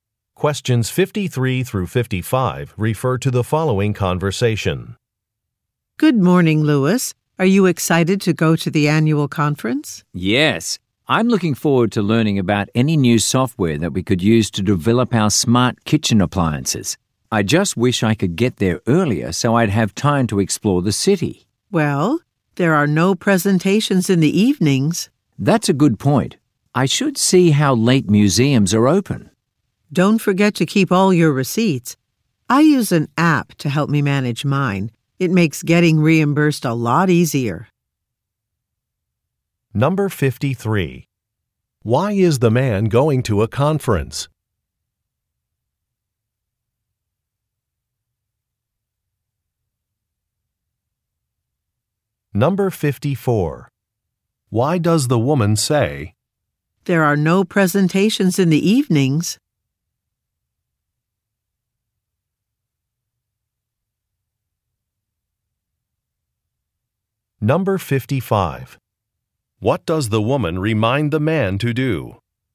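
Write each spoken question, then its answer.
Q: Why is the man going to a conference?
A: To learn about new software for developing smart kitchen appliances

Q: Why does the woman say, "There are no presentations in the evenings"?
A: To suggest he will have free time in the evenings to explore the city

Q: What does the woman remind the man to do?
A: Keep all his receipts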